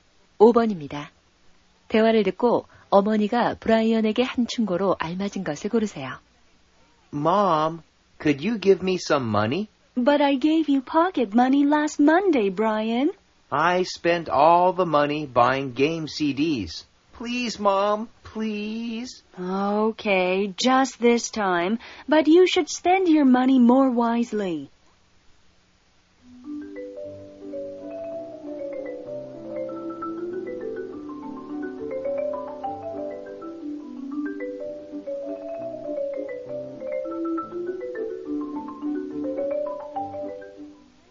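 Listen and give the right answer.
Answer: 돈을 더 현명하게 써라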